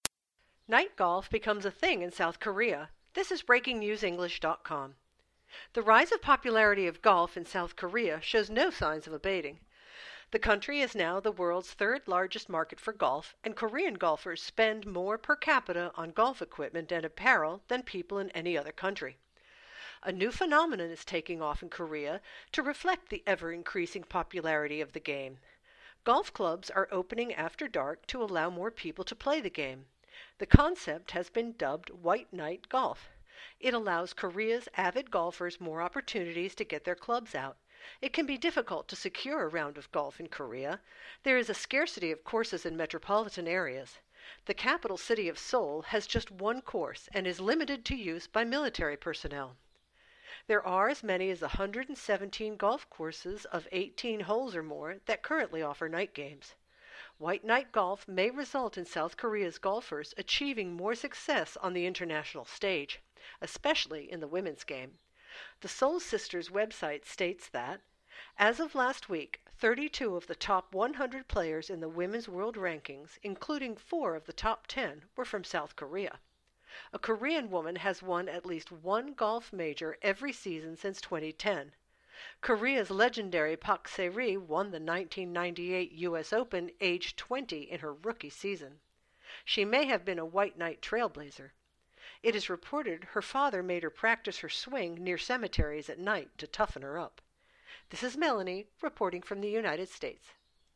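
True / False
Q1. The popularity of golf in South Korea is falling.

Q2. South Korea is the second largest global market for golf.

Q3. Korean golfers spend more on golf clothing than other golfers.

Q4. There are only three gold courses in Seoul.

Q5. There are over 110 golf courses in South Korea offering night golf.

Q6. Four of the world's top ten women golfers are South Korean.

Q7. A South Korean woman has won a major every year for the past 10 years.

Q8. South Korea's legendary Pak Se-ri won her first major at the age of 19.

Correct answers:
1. F
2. F
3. T
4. F
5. T
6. T
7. T
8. F

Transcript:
Night golf becomes a thing in South Korea
The rise of the popularity of golf in South Korea shows no sign of abating. The country is now the world's third largest market for golf, and Korean golfers spend more per capita on golf equipment and apparel than people in any other country. A new phenomenon is taking off in Korea to reflect the ever-increasing popularity of the game. 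Golf clubs are opening after dark to allow more people to play the game. The concept has been dubbed "white night" golf. It allows Korea's avid golfers more opportunities to get their clubs out. It can be difficult to secure a round of golf in Korea. There is a scarcity of courses in metropolitan areas. The capital city of Seoul has just one course and is limited to use by military personnel.
There are as many as 117 golf courses of 18 holes or more that currently offer night games. White night golf may result in South Korea's golfers achieving more success on the international stage, especially in the women's game. The SeoulSisters website states that: "As of last week, 32 of the top 100 players in the women's world rankings, including 4 of the top 10, were from South Korea." A Korean woman has won at least one golf major every season since 2010. Korea's legendary Pak Se-ri won the 1998 US Open aged 20 in her rookie season. 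She may have been a white night trailblazer. It is reported her father made her practice her swing near cemeteries at night to toughen her up.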